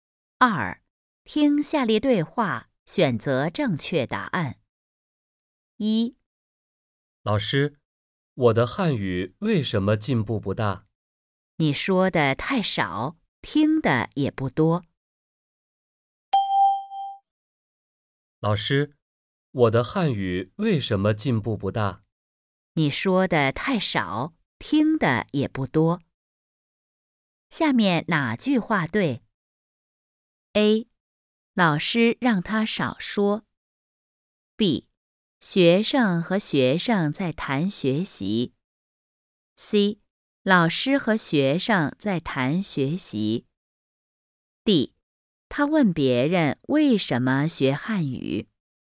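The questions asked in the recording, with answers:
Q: 下面哪句话对?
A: C: 老师和学生在谈学习。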